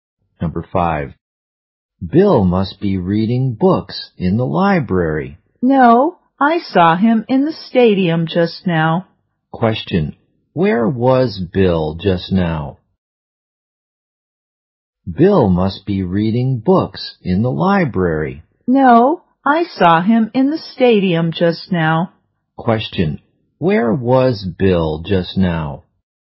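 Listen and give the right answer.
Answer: In the stadium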